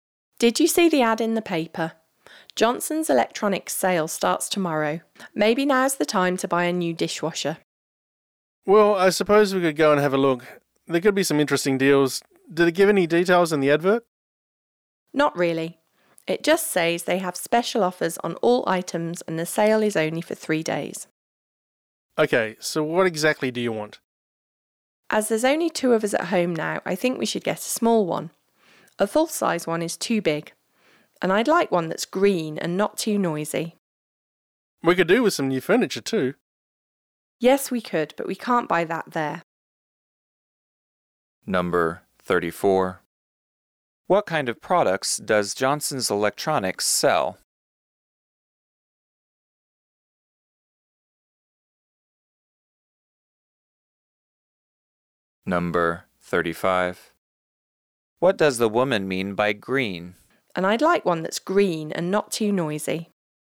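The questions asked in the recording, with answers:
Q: What kind of products does Johnson's Electronics sell?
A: Electrical appliances, such as dishwashers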